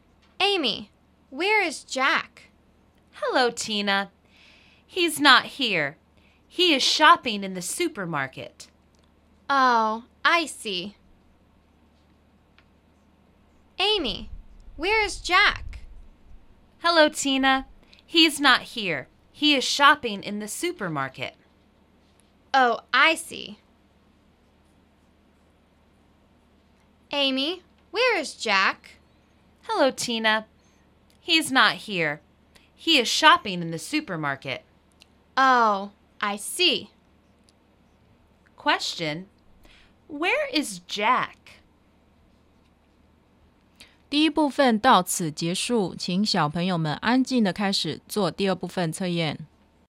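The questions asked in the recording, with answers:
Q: where is Jack?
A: In the supermarket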